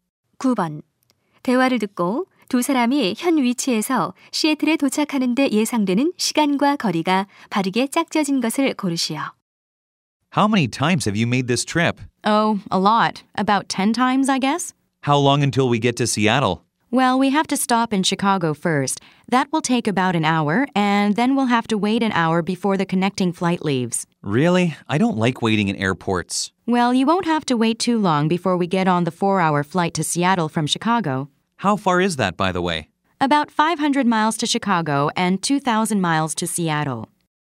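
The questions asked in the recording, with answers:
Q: 대화를 듣고 두 사람이 현 위치에서 시애틀에 도착하는 데 예상되는 시간과 거리가 바르게 짝지어진 것을 고르시오.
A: 약 6시간, 약 2,500마일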